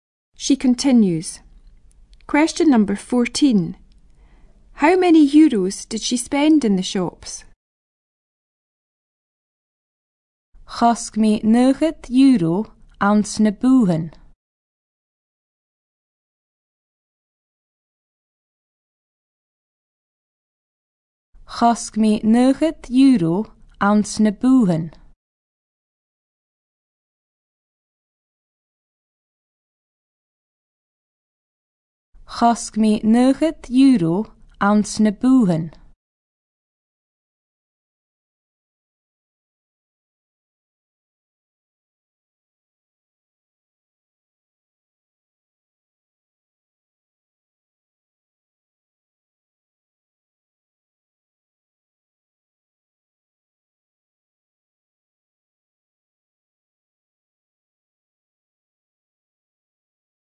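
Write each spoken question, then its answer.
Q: How many euros did she spend in the shops?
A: 90 euros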